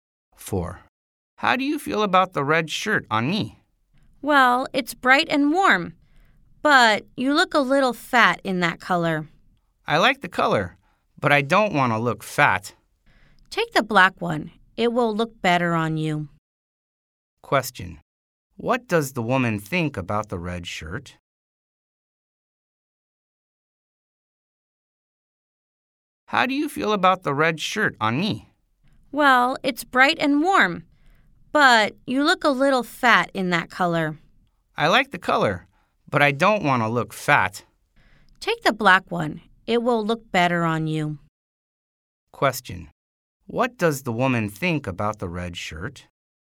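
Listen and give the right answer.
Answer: It's bright and warm, but makes him look a little fat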